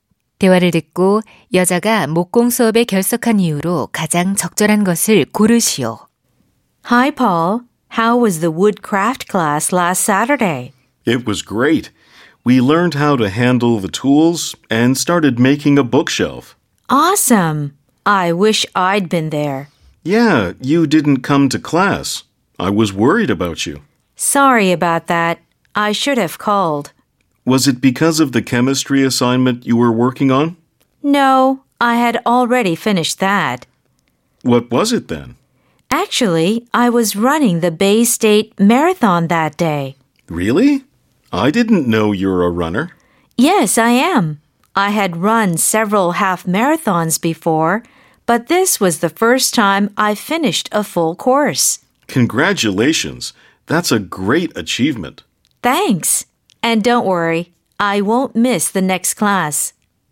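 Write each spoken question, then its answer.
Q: 대화를 듣고 여자가 목공 수업에 결석한 이유로 가장 적절한 것을 고르시오.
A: 마라톤 대회에 참가해서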